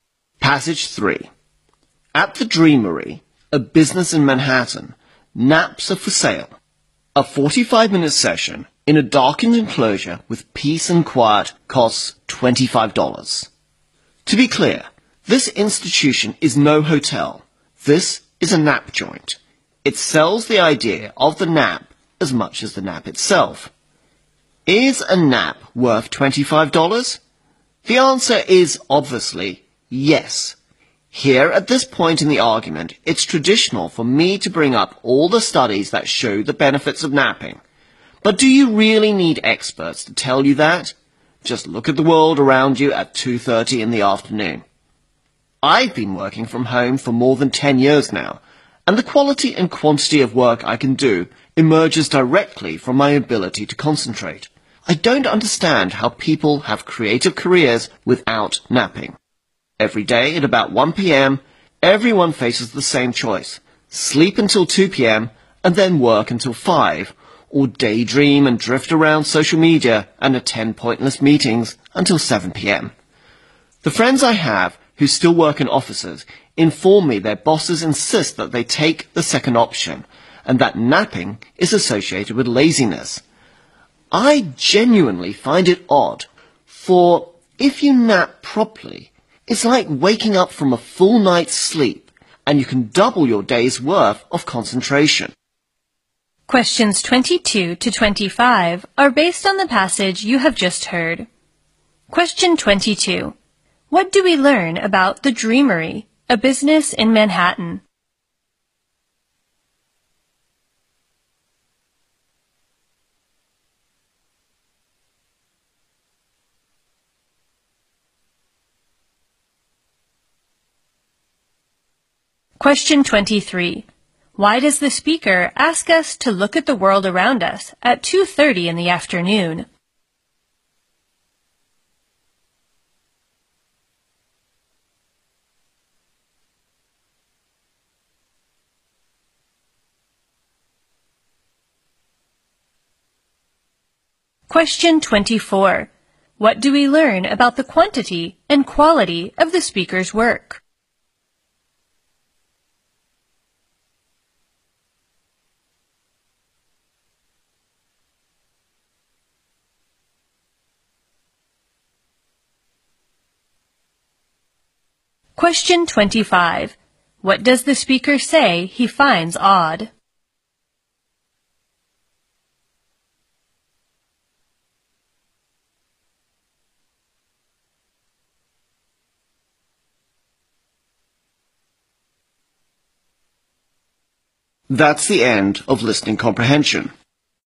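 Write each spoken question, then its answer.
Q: What do we learn about the Dreamery, a business in Manhattan?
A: It sells naps.

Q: Why does the speaker ask us to look at the world around us at 2:30 in the afternoon?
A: To show that people obviously need naps, without experts.

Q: What do we learn about the quantity and quality of the speaker's work?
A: They come directly from his ability to concentrate.

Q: What does the speaker say he finds odd?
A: That bosses link napping with laziness.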